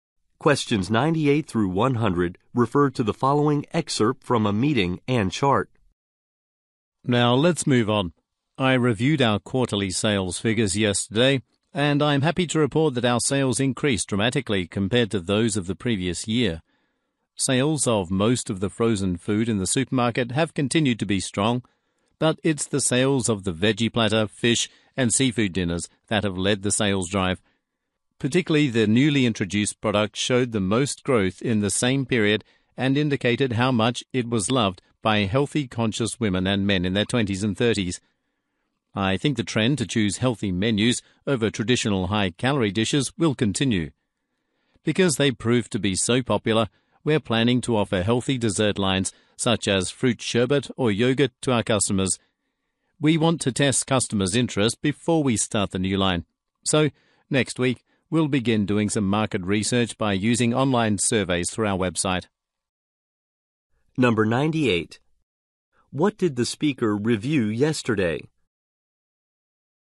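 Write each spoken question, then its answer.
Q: What did the speaker review yesterday?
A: Quarterly sales figures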